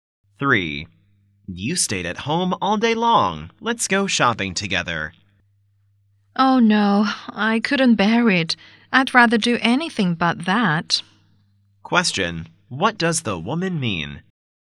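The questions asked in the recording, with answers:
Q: What does the woman mean?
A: She doesn't want to go shopping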